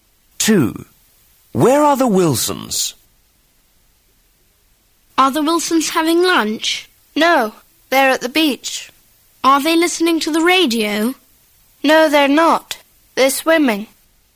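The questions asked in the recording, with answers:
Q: Where are the Wilsons?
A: At the beach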